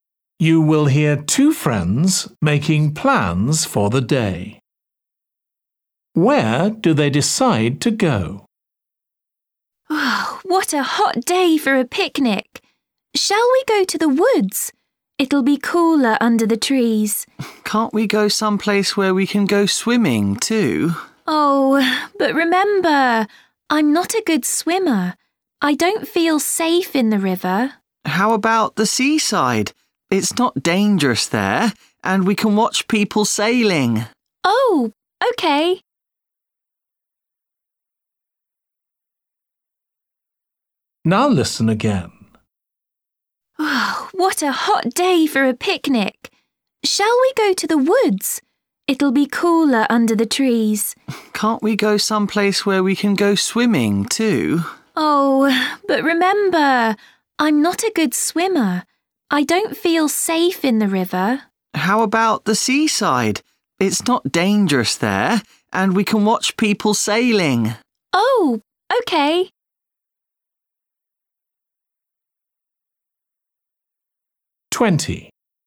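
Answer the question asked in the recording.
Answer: the seaside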